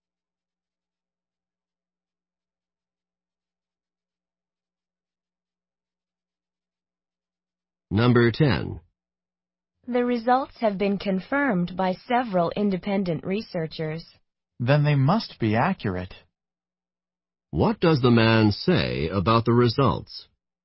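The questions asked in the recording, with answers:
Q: What does the man say about the results?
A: They must be accurate.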